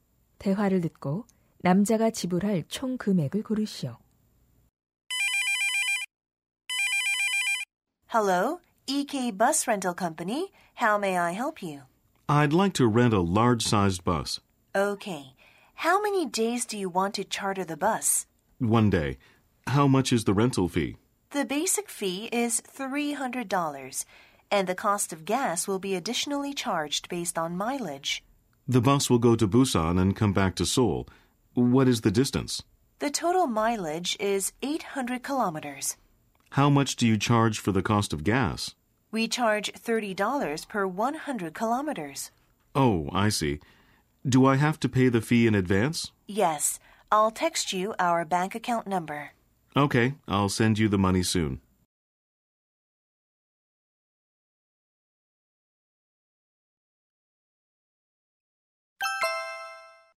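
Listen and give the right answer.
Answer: $540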